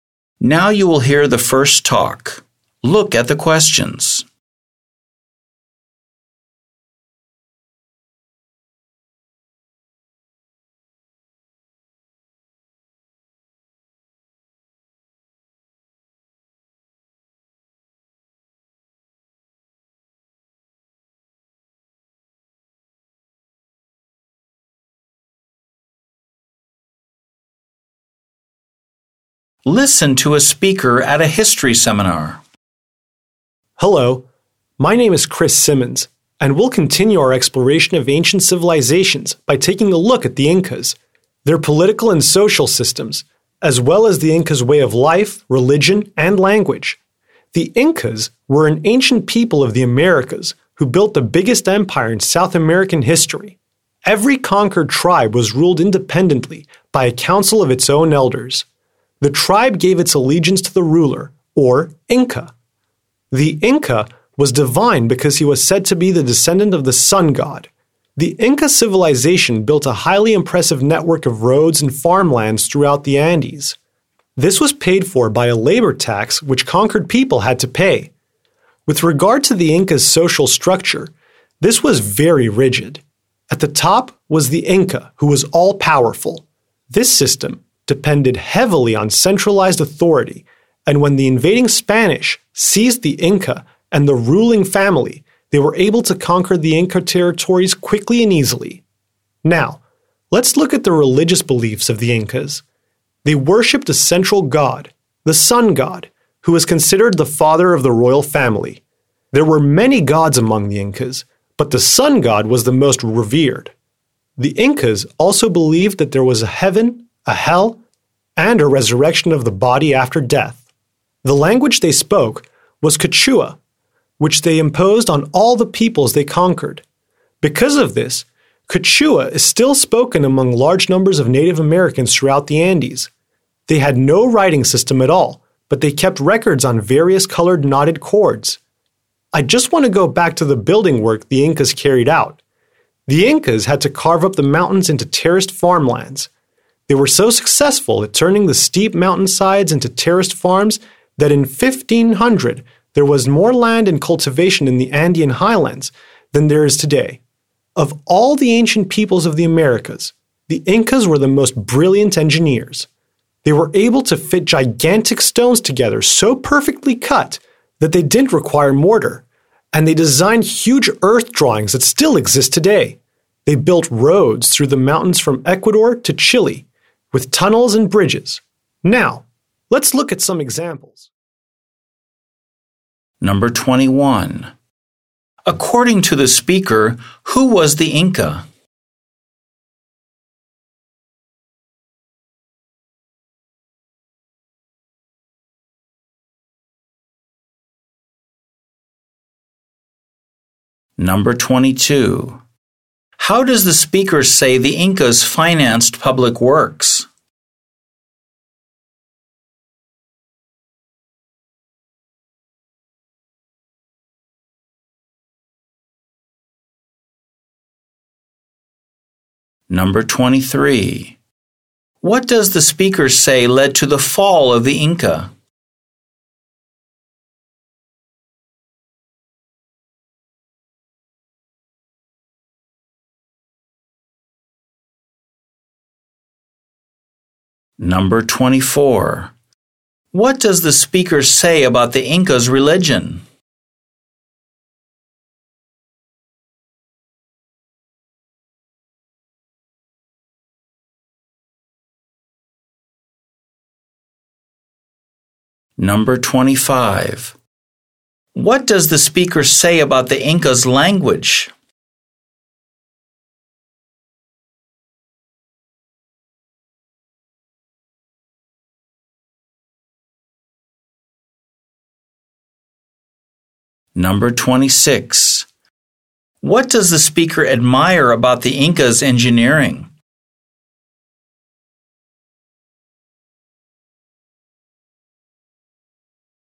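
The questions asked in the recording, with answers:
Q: According to the speaker, who was the Inca?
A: The all-powerful divine ruler, said to descend from the sun god

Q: How does the speaker say the Incas financed public works?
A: Through a labor tax paid by conquered people

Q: What does the speaker say led to the fall of the Inca?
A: Reliance on centralized authority, so the Spanish conquered them quickly by seizing the Inca and the royal family

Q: What does the speaker say about the Incas' religion?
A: They worshipped many gods, the sun god most of all, and believed in heaven, hell and resurrection

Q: What does the speaker say about the Incas' language?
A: Quechua was imposed on conquered peoples and is still widely spoken in the Andes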